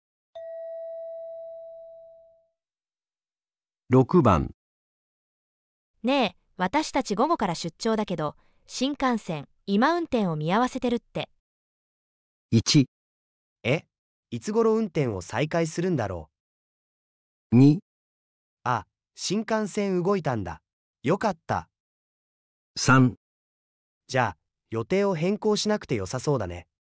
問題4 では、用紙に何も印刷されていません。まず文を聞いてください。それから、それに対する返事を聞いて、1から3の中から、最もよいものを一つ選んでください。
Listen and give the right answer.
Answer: 1

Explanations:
说话人只报告"暂停运行",并未提恢复信息,听者最自然会追问"什么时候能恢复?",选项1符合。选项2明显和"暂停"矛盾,选项3则错误地认为可以按原计划走,也与"暂停中"不符。

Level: N1